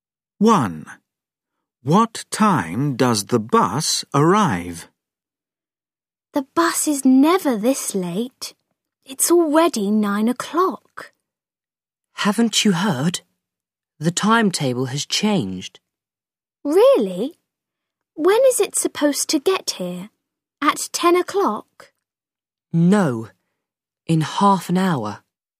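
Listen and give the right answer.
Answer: 9:30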